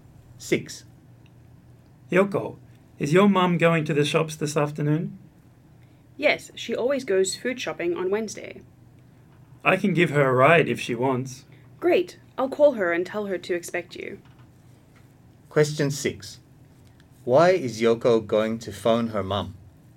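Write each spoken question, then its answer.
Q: Why is Yoko going to phone her mom?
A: To tell her John will give her a ride to the shops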